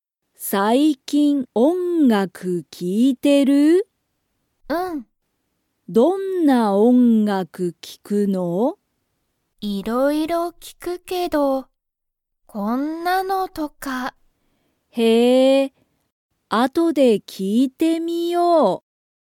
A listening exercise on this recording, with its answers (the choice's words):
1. さきは最近(さいきん)、音楽(おんがく)を聴(き)いていますか?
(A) はい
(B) いいえ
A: はい

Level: Level 1